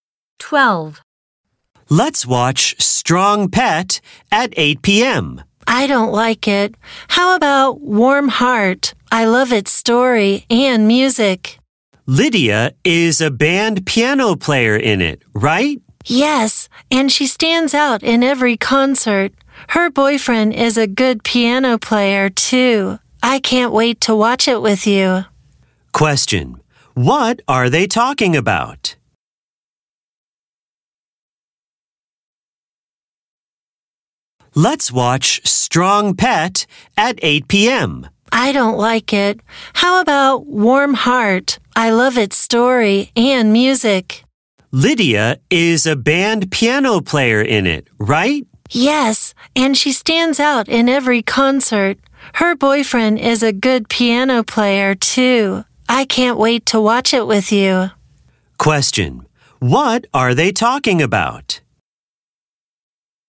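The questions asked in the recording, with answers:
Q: Question, what are they talking about?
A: A TV show, Warm Heart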